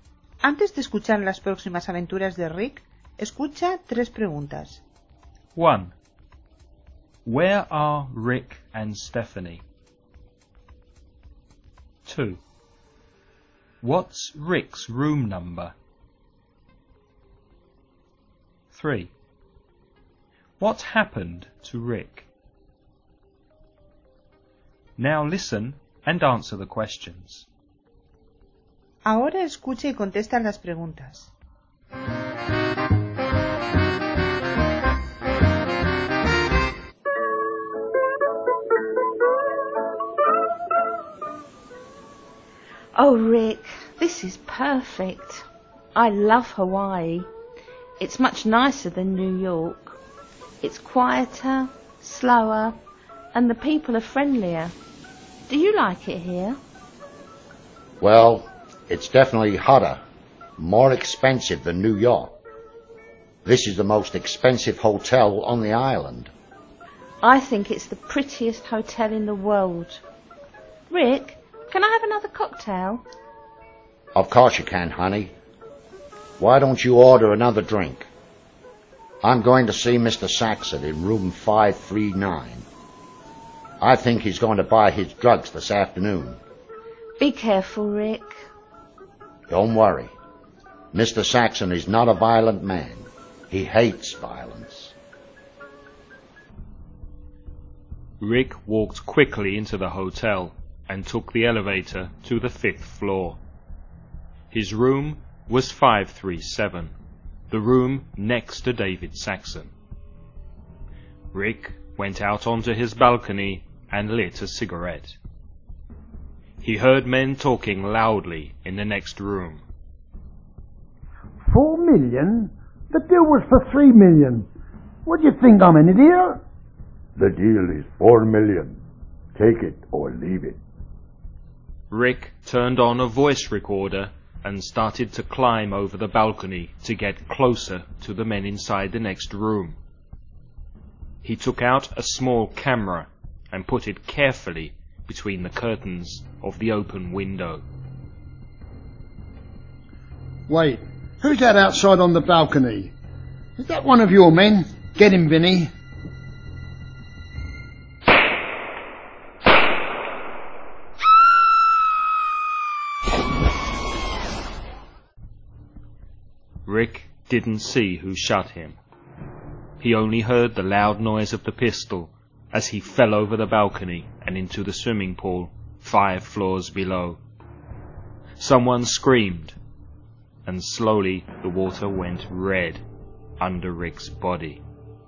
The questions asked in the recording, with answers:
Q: Where are Rick and Stephanie?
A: In a hotel in Hawaii.

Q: What's Rick's room number?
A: Room 537.

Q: What happened to Rick?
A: He was shot.